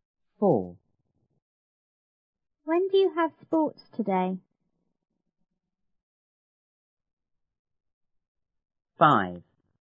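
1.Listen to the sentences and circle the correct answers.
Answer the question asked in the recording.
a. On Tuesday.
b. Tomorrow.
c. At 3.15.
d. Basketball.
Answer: c. At 3.15.

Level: 初中英语广州版1B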